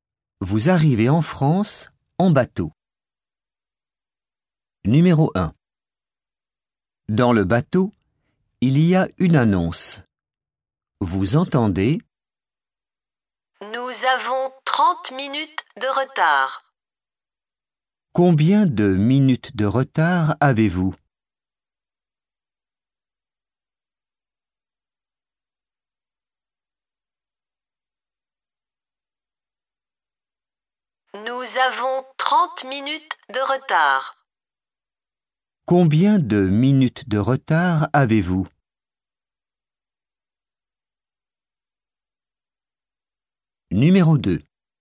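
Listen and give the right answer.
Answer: 30 minutes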